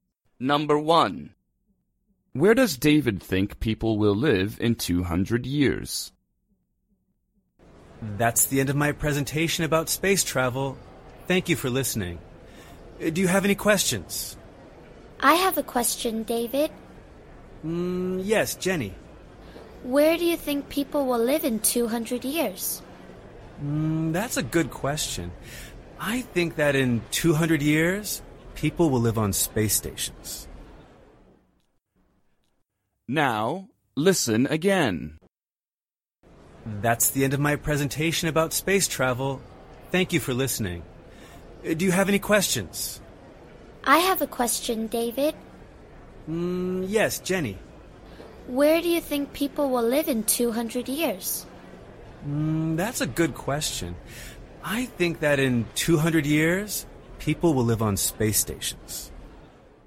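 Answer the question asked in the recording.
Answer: on space stations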